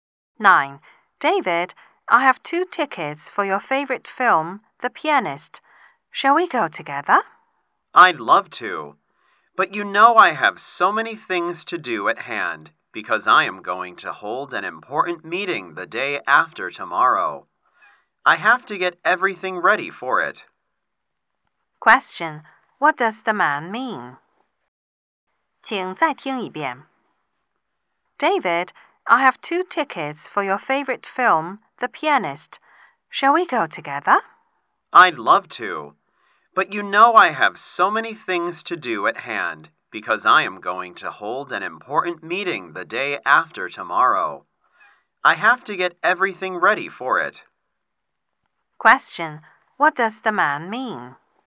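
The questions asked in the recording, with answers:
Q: Question. What does the man mean?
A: He can't go to the film because he is busy getting ready for an important meeting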